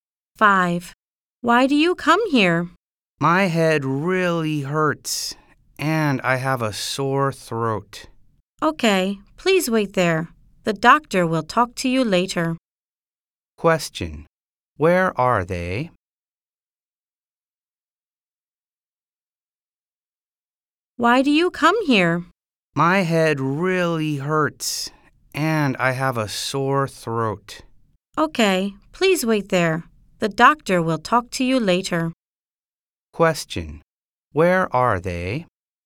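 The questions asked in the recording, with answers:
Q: Where are they?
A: In a hospital/clinic.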